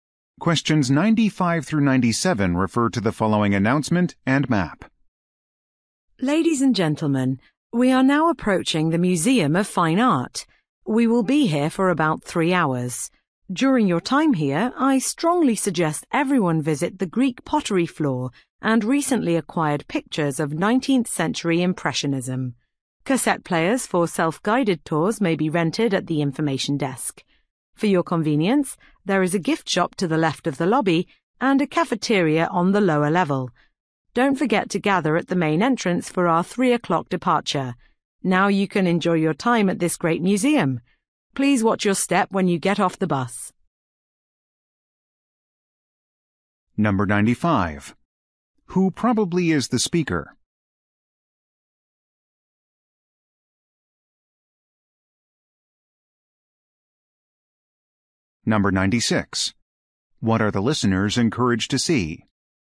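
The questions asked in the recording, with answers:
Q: Who probably is the speaker?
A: A tour guide

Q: What are the listeners encouraged to see?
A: The Greek pottery and 19th-century Impressionist pictures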